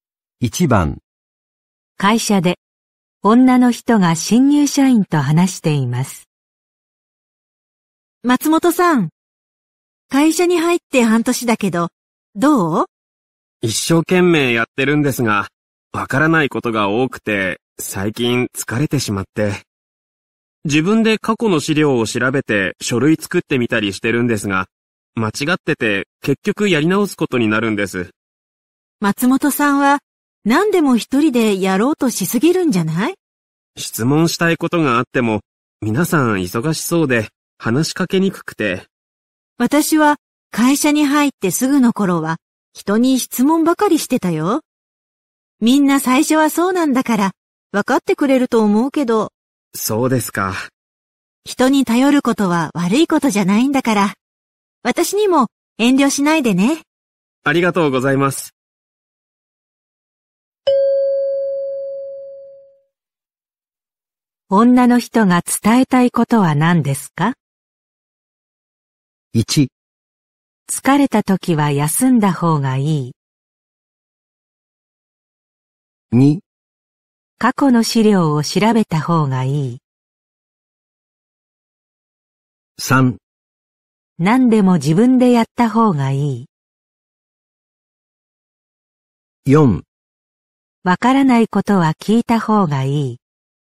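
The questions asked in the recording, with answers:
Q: 女の人が伝えたいことは何ですか?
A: 4: わからないことは聞いた方がいい。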